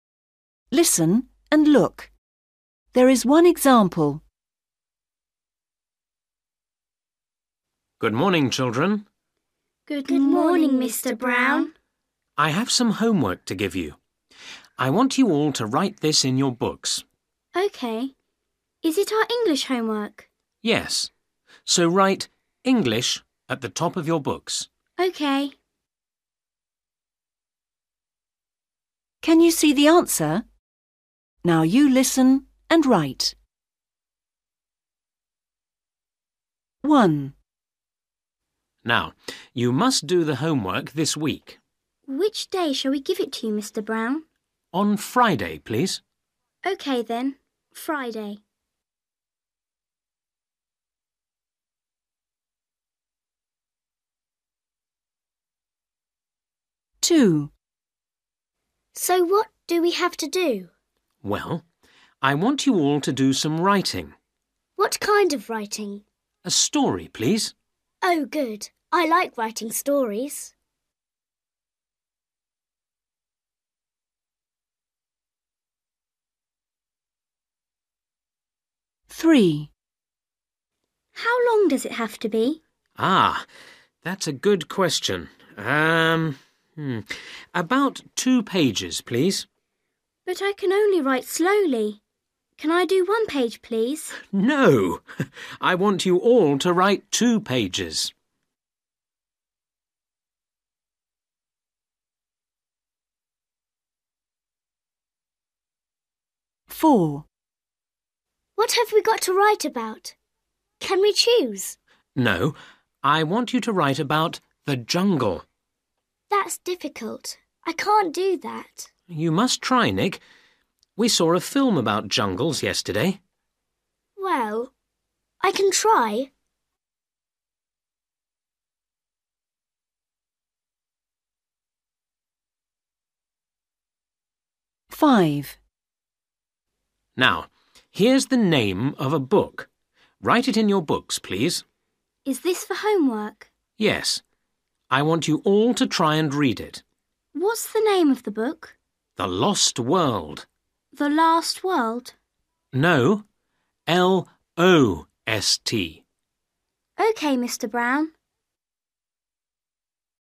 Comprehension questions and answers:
Listen and write. There is one example.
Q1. For which day? .....................................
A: Friday

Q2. What to write: .....................................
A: (a) story

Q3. How long? ........................... pages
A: (about) 2/two

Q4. What about? .....................................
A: (the) jungles/jungles

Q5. Book to read: 'The ......................... World'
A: Lost

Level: A1